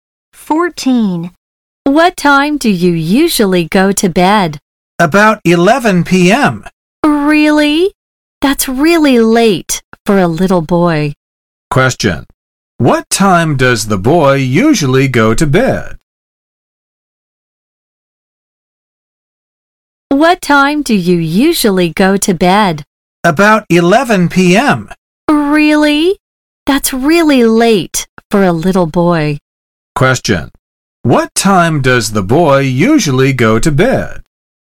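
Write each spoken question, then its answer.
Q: What time does the boy usually go to bed?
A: About 11 p.m.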